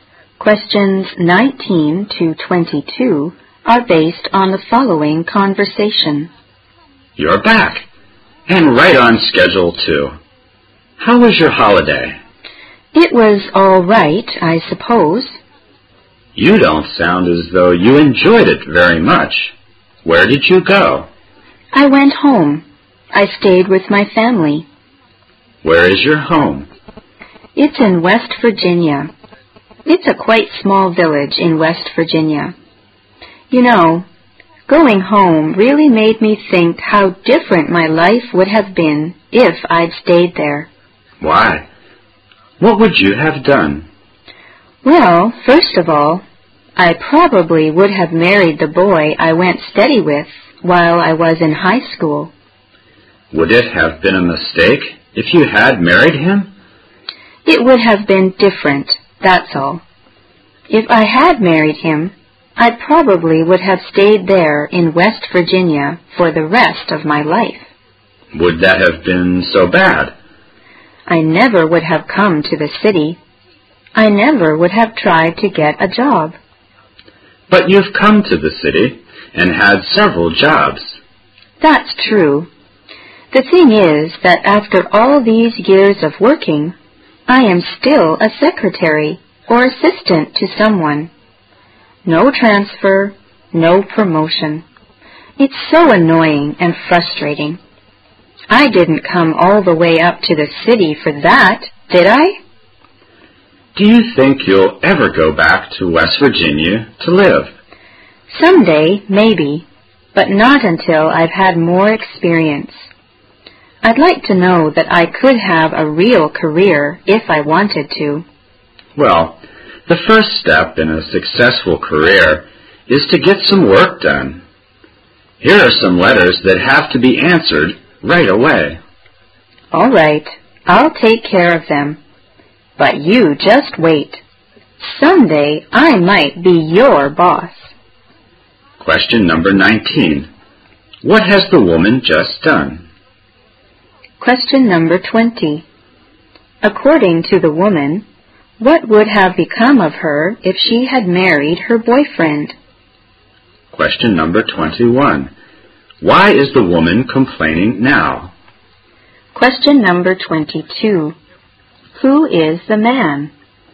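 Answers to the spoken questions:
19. Come back from a holiday with her family in West Virginia
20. She would have stayed in West Virginia for the rest of her life.
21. She is still a secretary or assistant, with no transfer or promotion.
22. Her boss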